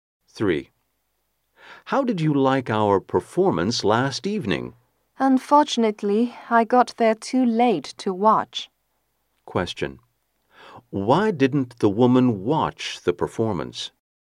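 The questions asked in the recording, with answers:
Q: Why didn't the woman watch the performance?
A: She got there too late.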